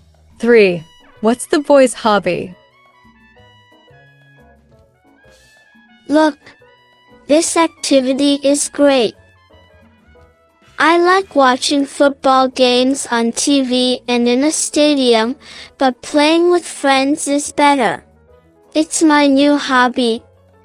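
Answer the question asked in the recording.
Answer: playing football with friends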